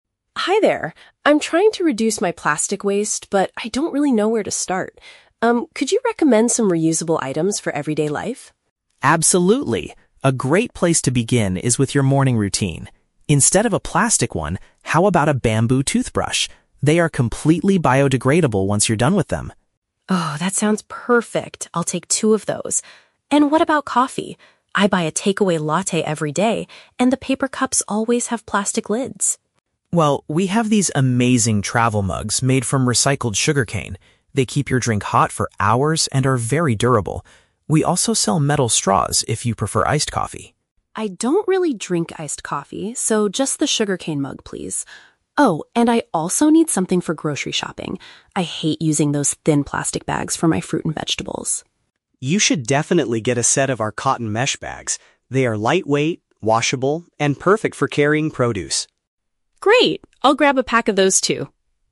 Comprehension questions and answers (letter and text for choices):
Listen to a conversation between a customer and a store assistant. Choose the correct answer (A, B, or C) for each question.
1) What is the customer's main goal in the store?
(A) To purchase organic food for her daily meals.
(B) To find daily products that create less environmental trash.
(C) To buy a special coffee blend for her morning routine.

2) Which item does the customer decide NOT to buy?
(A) A metal straw.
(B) A bamboo toothbrush.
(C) A travel mug.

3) What is one benefit of the cotton mesh bags mentioned by the assistant?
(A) They are much cheaper than standard supermarket bags.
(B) They help keep vegetables fresh for a longer time.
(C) They can be cleaned easily after being used.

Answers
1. (B) To find daily products that create less environmental trash.
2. (A) A metal straw.
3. (C) They can be cleaned easily after being used.

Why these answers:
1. Anna states at the beginning that she wants to "reduce my plastic waste" and asks for "reusable items for everyday life." (Paraphrasing: create less environmental trash = reduce plastic waste; daily products = items for everyday life). Why the trap is wrong: Option (A) is a trap. Anna mentions grocery shopping for "fruit and vegetables," but she is looking for bags to carry them, not buying the food itself at this store. Option (C) is a trap because she talks about her daily coffee habit, but she wants a cup, not coffee beans.
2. Ben suggests metal straws for iced coffee, but Anna rejects them, saying, "I don't really drink iced coffee, so just the sugarcane mug, please." Why the trap is wrong: Options (B) and (C) are traps. The bamboo toothbrush and the travel mug (sugarcane mug) are both mentioned in the audio, but the customer does buy them ("I'll take two of those", "just the sugarcane mug, please"). The question asks what she does not buy.
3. Ben describes the cotton mesh bags as "washable," which means they can be washed or cleaned. (Paraphrasing: can be cleaned easily = washable). Why the trap is wrong: Option (A) is the trap. The assistant mentions "thin plastic bags" (standard supermarket bags), but he does not compare the prices. Option (B) is a plausible benefit of mesh bags in real life, but the assistant never mentions keeping vegetables fresh in the dialogue.

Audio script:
Anna: Hi there. I'm trying to reduce my plastic waste, but I don't really know where to start. Um, could you recommend some reusable items for everyday life?
Ben: Absolutely! A great place to begin is with your morning routine. Instead of a plastic one, how about a bamboo toothbrush? They are completely biodegradable once you're done with them.
Anna: Oh, that sounds perfect. I'll take two of those. And what about coffee? I buy a takeaway latte every day, and the paper cups always have plastic lids.
Ben: Well, we have these amazing travel mugs made from recycled sugarcane. They keep your drink hot for hours and are very durable. We also sell metal straws if you prefer iced coffee.
Anna: I don't really drink iced coffee, so just the sugarcane mug, please. Oh, and I also need something for grocery shopping. I hate using those thin plastic bags for my fruit and vegetables.
Ben: You should definitely get a set of our cotton mesh bags. They are lightweight, washable, and perfect for carrying produce.
Anna: Great! I'll grab a pack of those too.